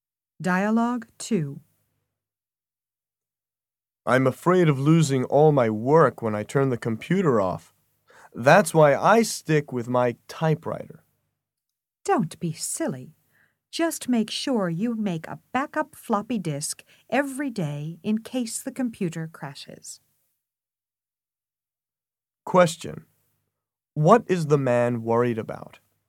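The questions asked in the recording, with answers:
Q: What is the man worried about?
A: Losing all his work when he turns the computer off.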